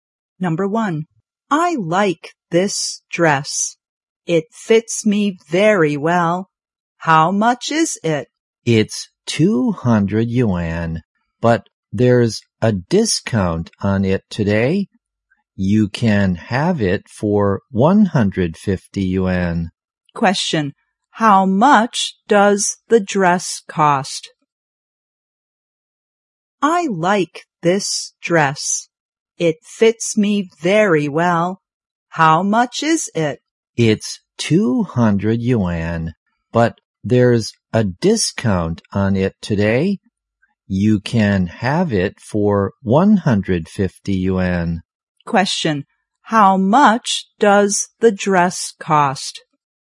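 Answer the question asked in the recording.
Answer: 150 yuan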